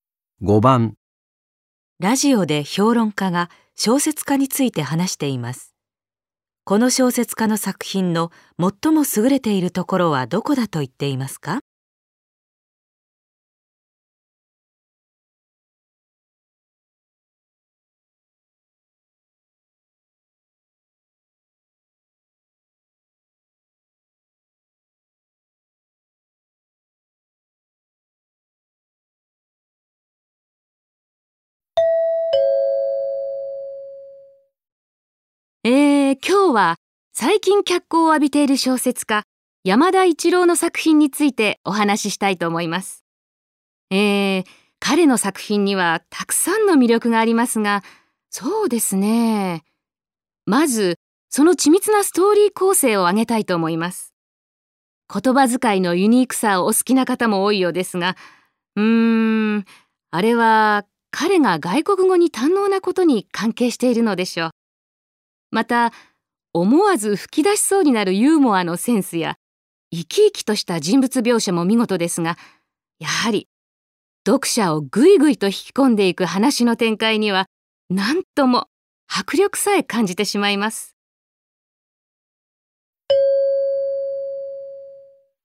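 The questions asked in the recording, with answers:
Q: この小説家の作品の最も優れているところはどこだと言っていますか?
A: 読者を引き込んでいく話の展開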